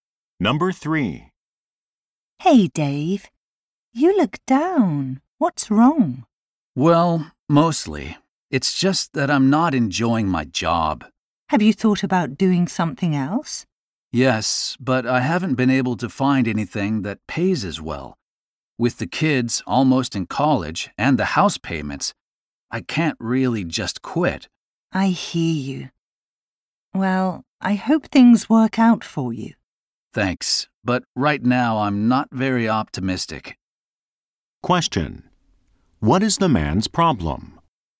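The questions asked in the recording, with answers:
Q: What is the man's problem?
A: He doesn't enjoy his job but can't afford to quit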